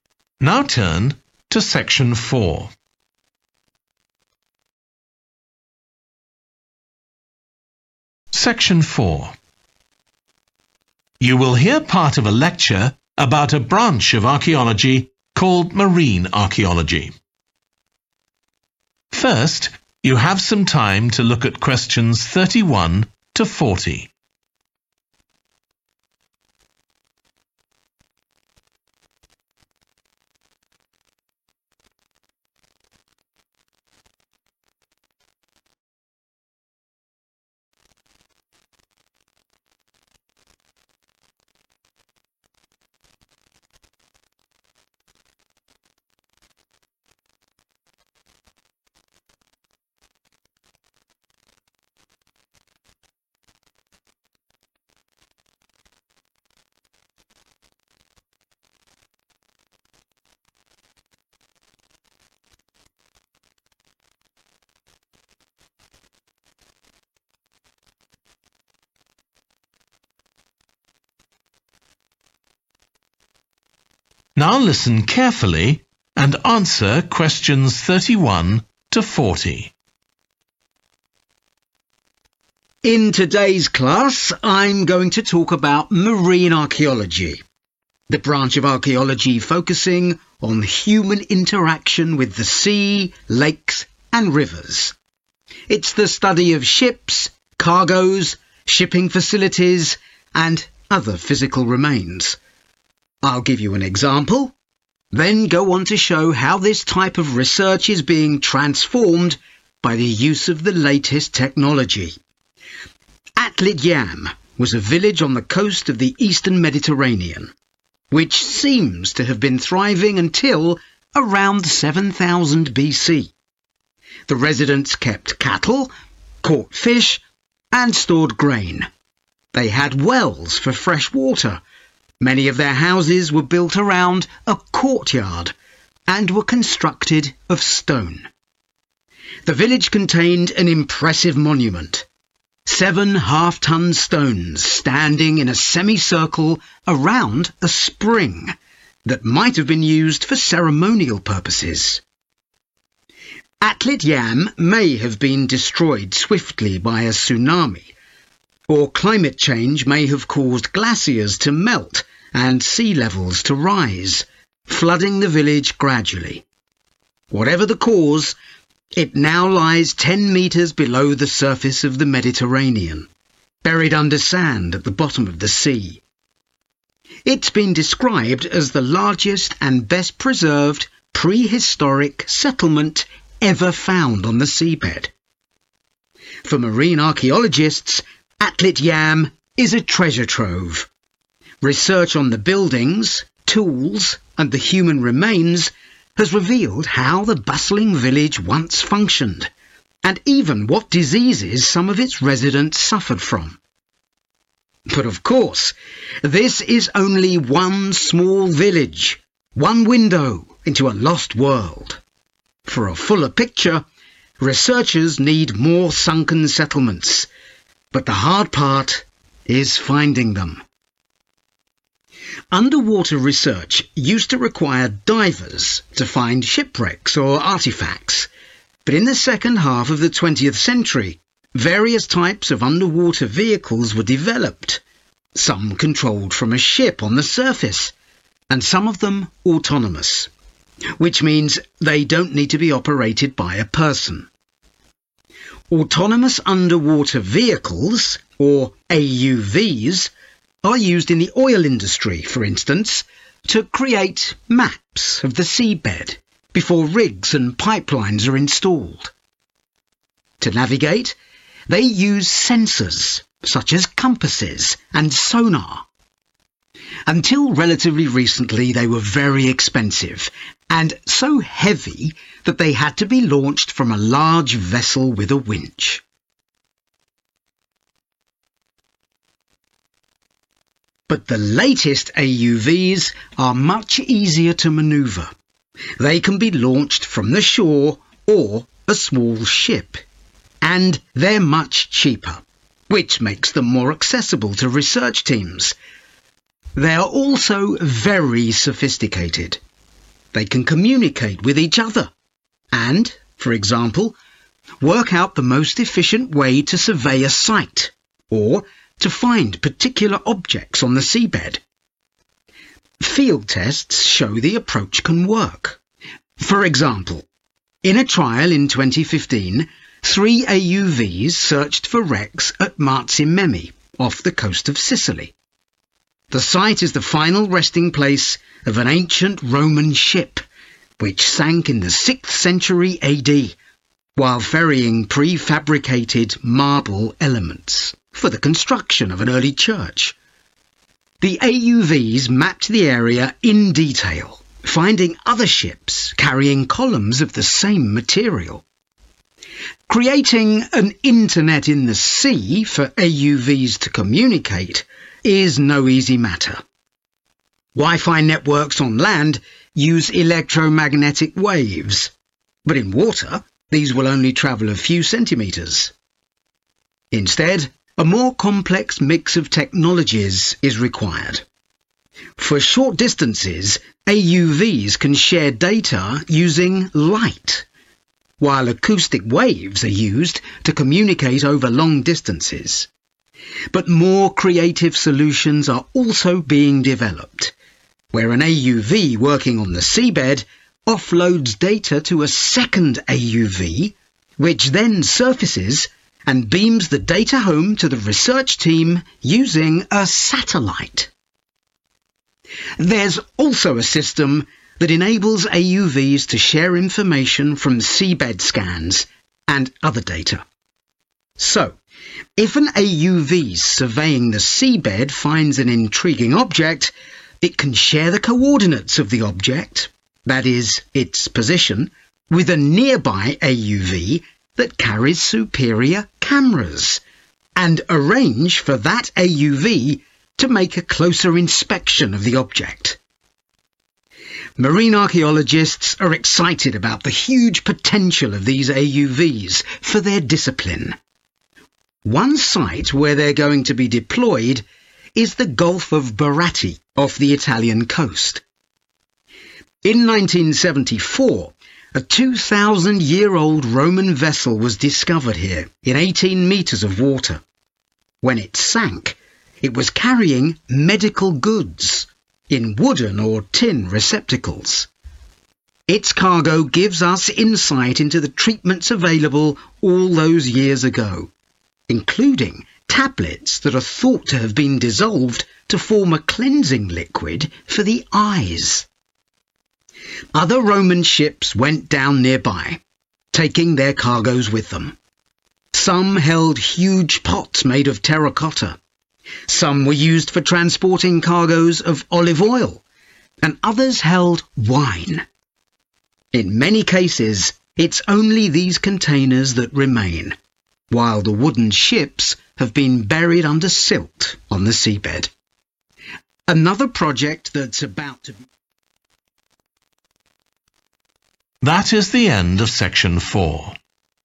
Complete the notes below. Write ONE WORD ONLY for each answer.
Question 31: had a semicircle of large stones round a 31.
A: spring

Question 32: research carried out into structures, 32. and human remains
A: tools

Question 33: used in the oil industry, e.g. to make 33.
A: maps

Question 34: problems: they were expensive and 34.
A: heavy

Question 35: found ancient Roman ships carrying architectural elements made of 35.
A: marble

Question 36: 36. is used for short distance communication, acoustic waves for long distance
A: light

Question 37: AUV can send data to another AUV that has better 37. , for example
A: camera(s)

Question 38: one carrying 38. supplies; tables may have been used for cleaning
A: medical

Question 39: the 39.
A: eyes

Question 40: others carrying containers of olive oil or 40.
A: wine